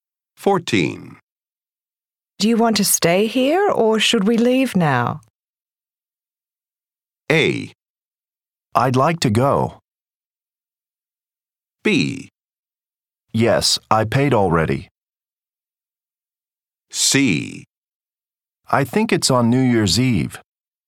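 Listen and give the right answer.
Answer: A: I'd like to go.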